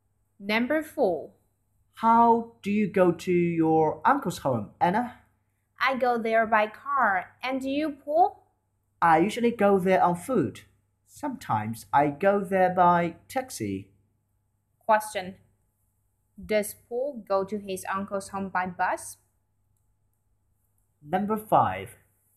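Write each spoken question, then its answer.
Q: Does Paul go to his uncle's home by bus?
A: No, he doesn't.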